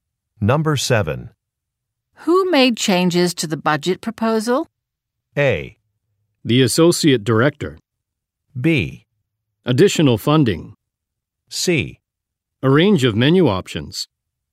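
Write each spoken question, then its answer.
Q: Who made changes to the budget proposal?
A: A: The associate director.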